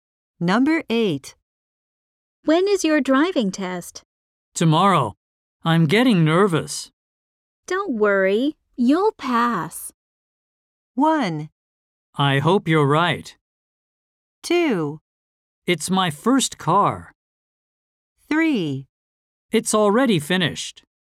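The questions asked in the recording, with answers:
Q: Don't worry, you'll pass.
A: 1: I hope you're right.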